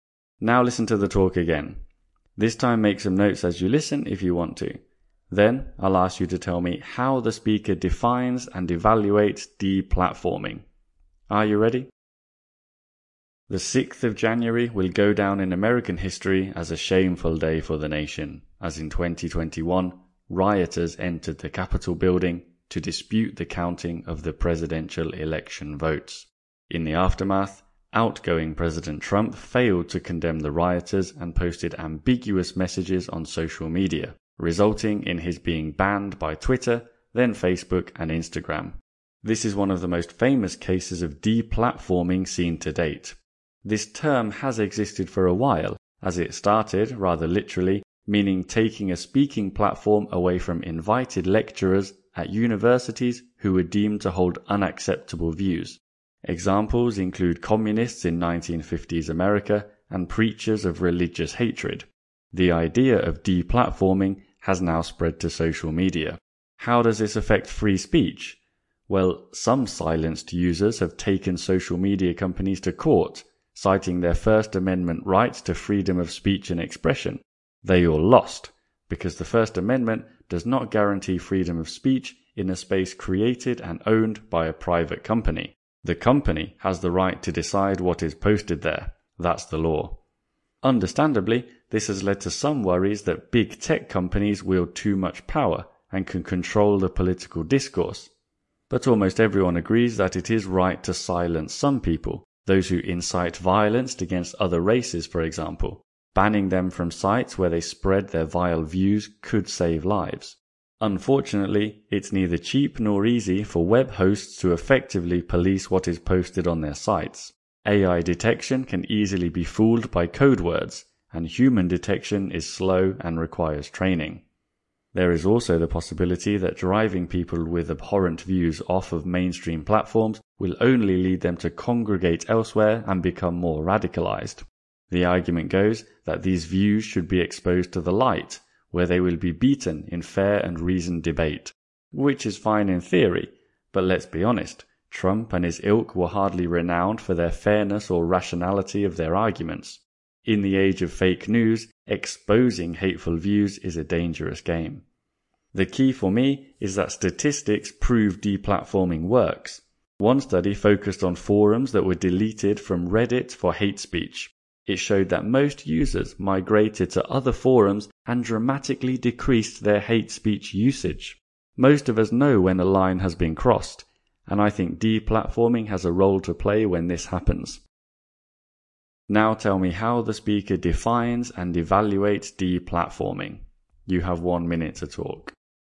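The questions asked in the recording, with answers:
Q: Now tell me how the speaker defines and evaluates deplatforming.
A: At first it meant taking a speaking platform away from invited university lecturers with unacceptable views; now it means banning users from social media. It is legal on private platforms and can save lives, but it is costly and hard to police, it gives tech companies a lot of power, and it may push people to radicalize elsewhere. Still, the speaker thinks statistics prove it works, as the Reddit study shows, so it has a role to play.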